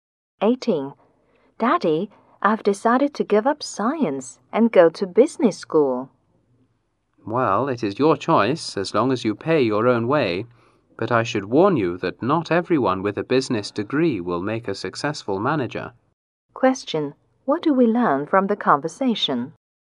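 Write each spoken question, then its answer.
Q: What do we learn from the conversation?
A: The father lets his child choose but the child must pay his own way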